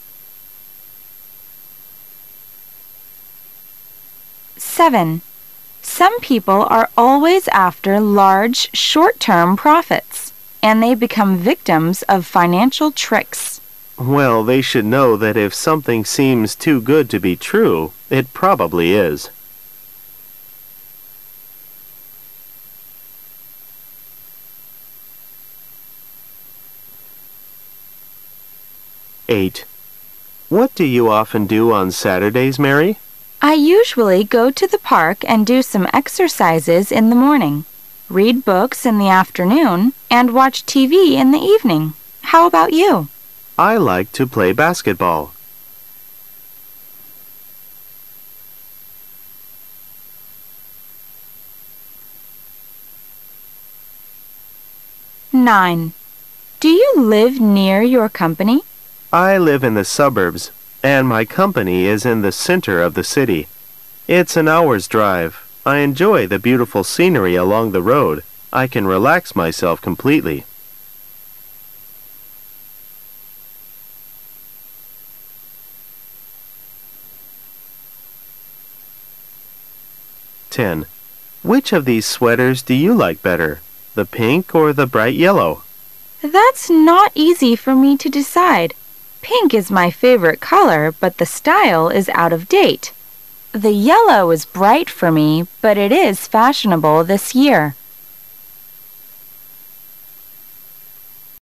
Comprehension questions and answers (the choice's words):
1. What does the man thinking people now?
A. If something seems far better than expected, it is probably not good.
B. If something seems far better than expected, grab it while you can.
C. If something seems far better than expected, it must be not good.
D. If something seems far better than expected, it must be very good.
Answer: If something seems far better than expected, it is probably not good.

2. What does Mary usually do on Saturday afternoon?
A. She reads books.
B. She goes to the park.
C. She does some exercises.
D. She watches TV.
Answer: She reads books.

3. How does the man feel about driving to work?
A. Relaxed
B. Tired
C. Bored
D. Lonely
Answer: Relaxed

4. What are the man and the woman talking about?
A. Colors.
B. Sweaters.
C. Films.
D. Music.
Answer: Sweaters.

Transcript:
[解析] W: Some people are always after large, short-term profits. And they become victims of financial tricks. M: Well, they should know that if something seems too good to be true, it probably is.
[解析] M: What do you often do on Saturdays, Mary? W: I usually go to the park and do some exercises in the morning, read books in the afternoon and watch TV in the evening. How about you? M: I like play basketball.
[解析] W: Do you live near your company? M: I live in the suburbs, and my company is in the center of the city. It's an hour's drive. I enjoy the beautiful scenery along the road. I can relax myself completely.
[解析] M: Which of these sweaters do you like better? The pink or the bright yellow? W: That's not easy for me to decide. Pink is my favorite color but the style is out of date; the yellow is bright for me, but it is fashionable this year.